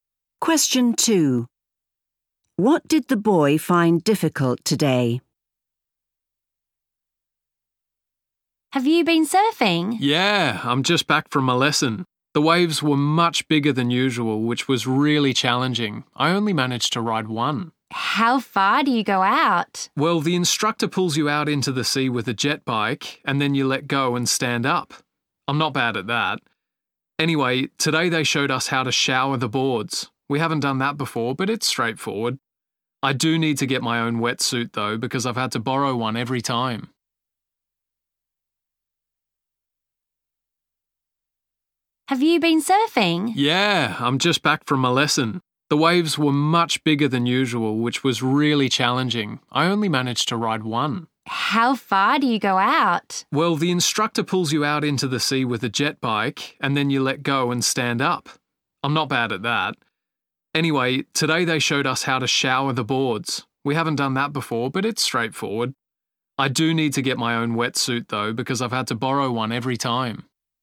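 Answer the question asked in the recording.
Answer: Riding the waves, which were much bigger than usual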